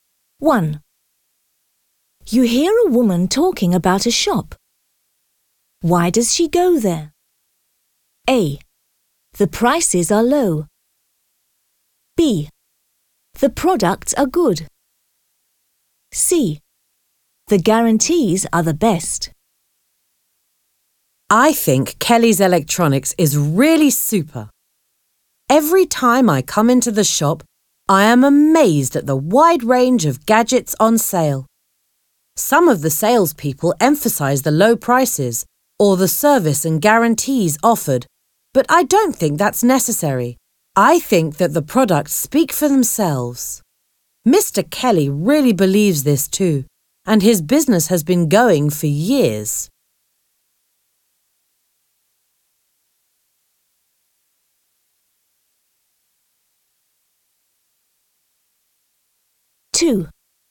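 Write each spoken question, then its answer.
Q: Why does she go there?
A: B: The products are good.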